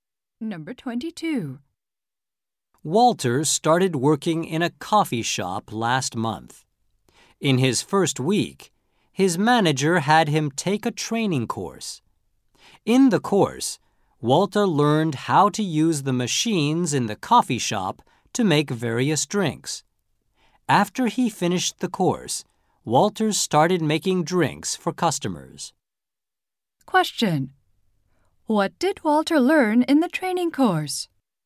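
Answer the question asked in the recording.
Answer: How to use the machines to make drinks.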